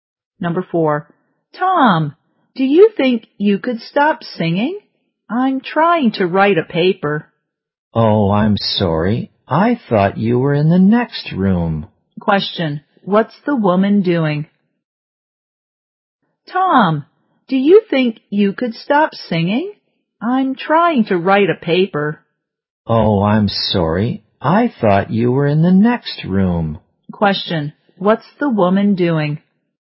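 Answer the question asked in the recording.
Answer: Writing a paper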